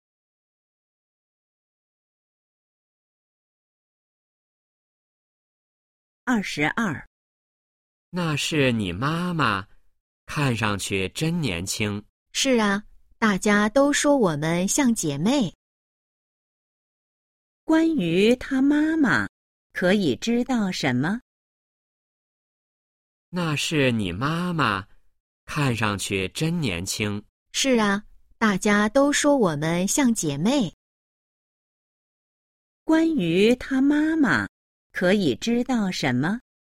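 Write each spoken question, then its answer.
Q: 关于她妈妈,可以知道什么?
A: 看上去很年轻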